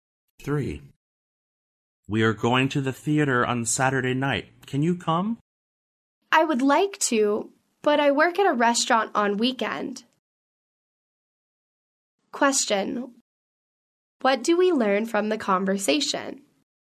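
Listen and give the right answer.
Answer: The man can't go to the theater because he works at a restaurant on weekends.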